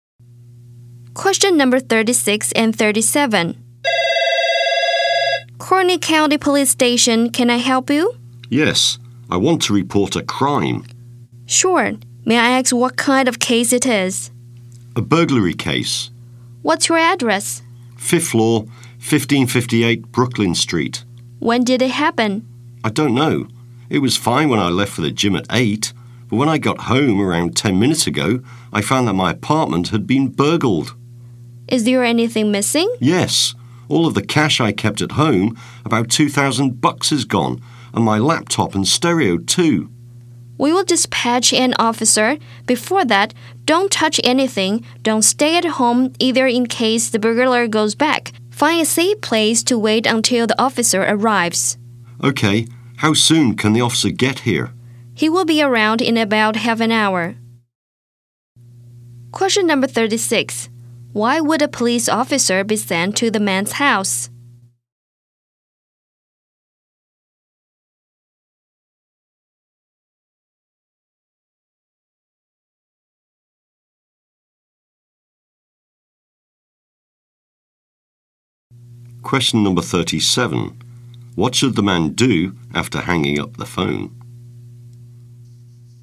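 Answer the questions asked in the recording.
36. Because his apartment was burgled (cash, laptop and stereo stolen).
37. Not touch anything, leave home and wait somewhere safe until the officer arrives.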